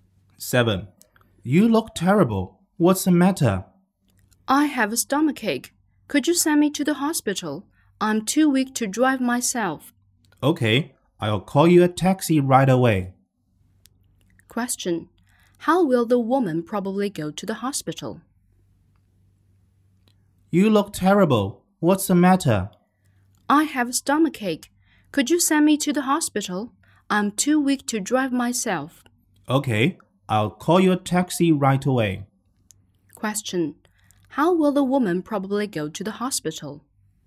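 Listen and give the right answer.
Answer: By taxi.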